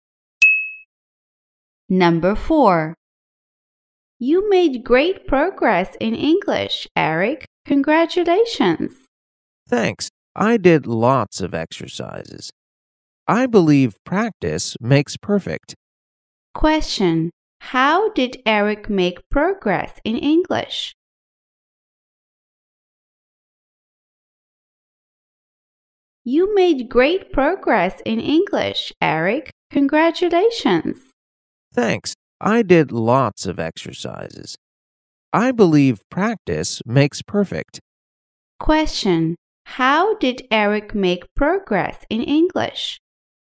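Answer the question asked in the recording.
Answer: By doing lots of exercises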